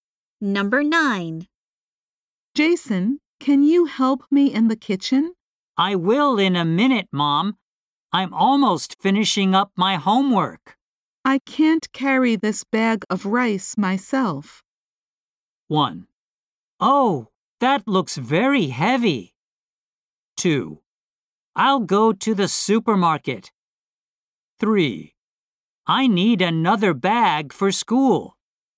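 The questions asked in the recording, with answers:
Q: I can't carry this bag of rice myself.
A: 1: Oh, that looks very heavy.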